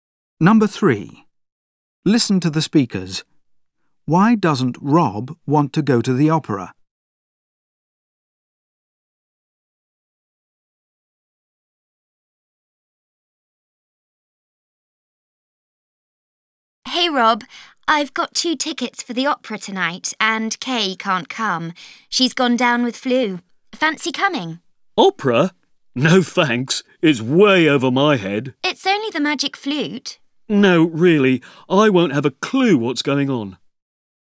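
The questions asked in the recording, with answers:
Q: Why doesn't Rob want to go to the opera?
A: He thinks he won't understand it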